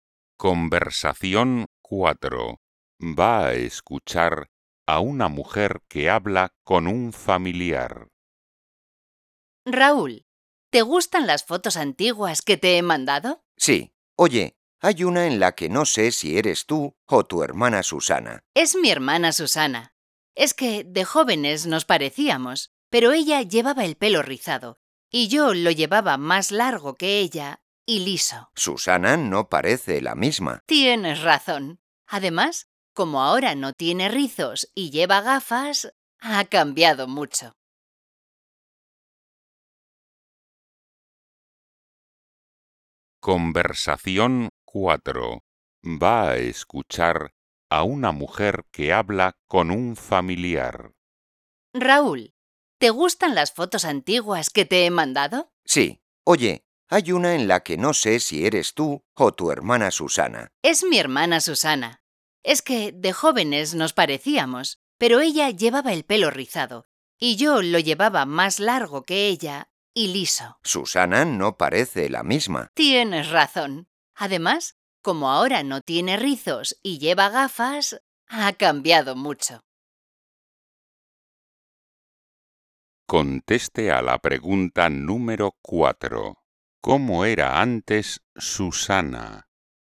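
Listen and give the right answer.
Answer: Tenía el pelo rizado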